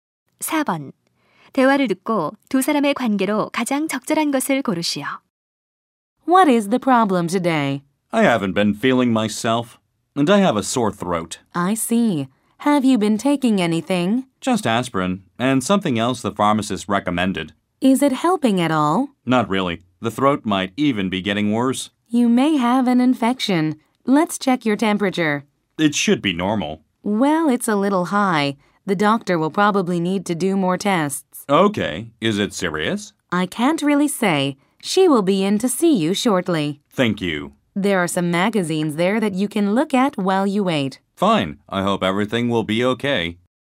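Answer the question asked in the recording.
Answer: 간호사와 환자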